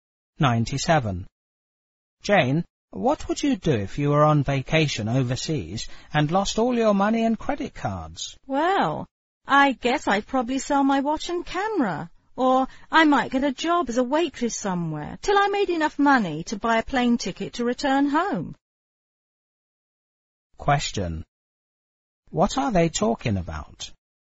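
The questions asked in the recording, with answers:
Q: What are they talking about?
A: What Jane would do if she lost her money and credit cards on vacation abroad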